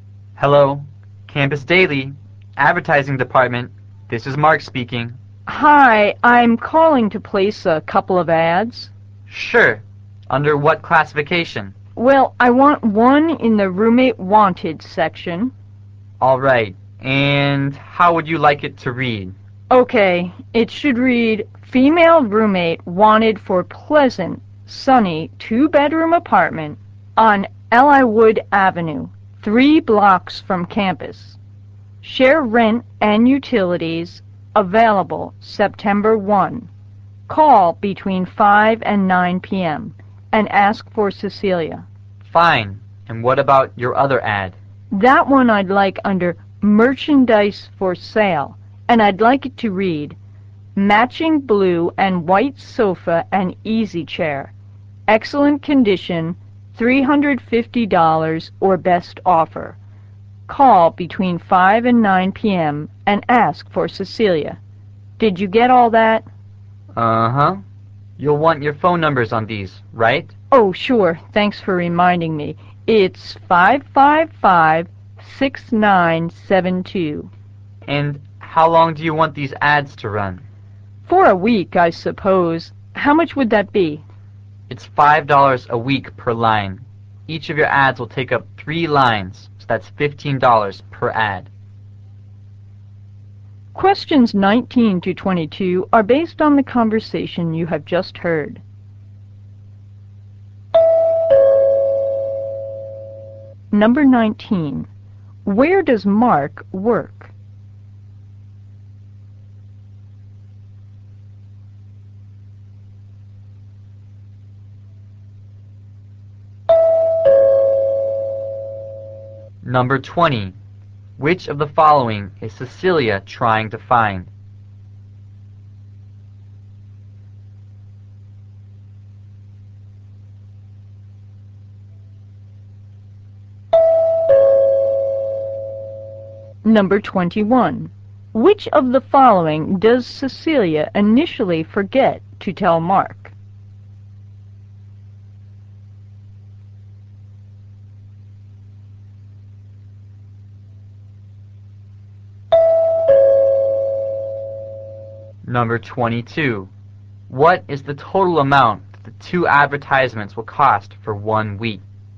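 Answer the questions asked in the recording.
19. In the advertising department of the Campus Daily
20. A female roommate
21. Her phone number
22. $30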